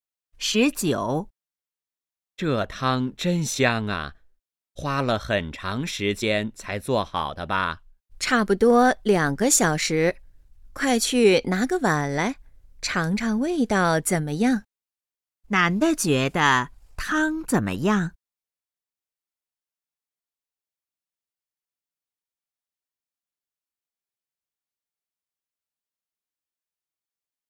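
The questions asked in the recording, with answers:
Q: 男的觉得汤怎么样?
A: 很香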